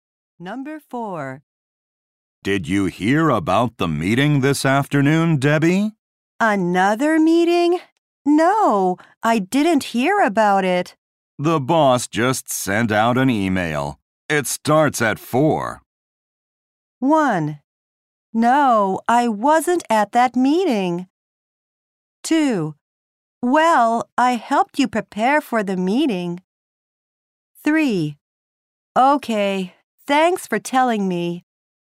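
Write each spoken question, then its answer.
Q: It starts at 4.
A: 3: Okay, thanks for telling me.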